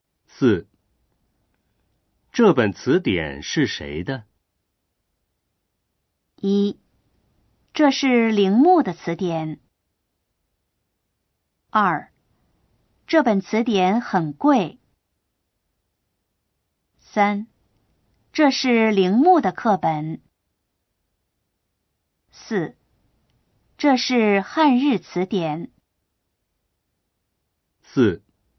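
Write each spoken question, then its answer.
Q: 这本词典是谁的?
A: 1: 这是铃木的词典。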